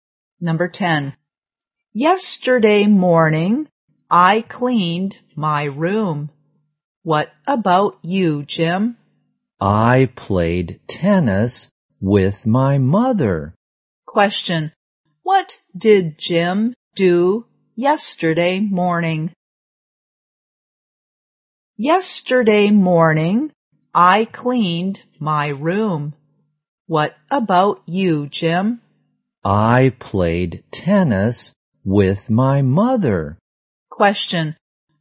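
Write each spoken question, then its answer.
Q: What did Jim do yesterday morning?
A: He played tennis with his mother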